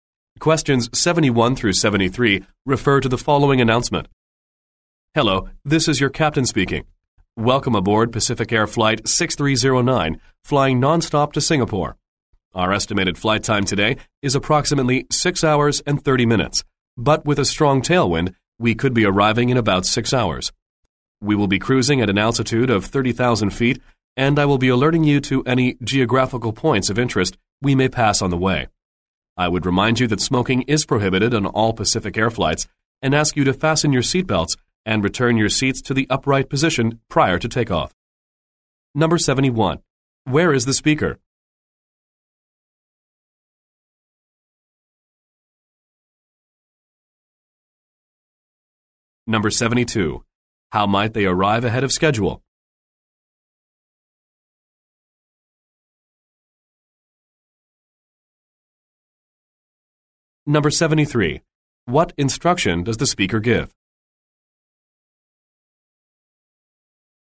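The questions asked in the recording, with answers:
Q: Where is the speaker?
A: On an airplane (Pacific Air flight to Singapore)

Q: How might they arrive ahead of schedule?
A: Because of a strong tailwind

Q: What instruction does the speaker give?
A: Fasten seatbelts and return seats to the upright position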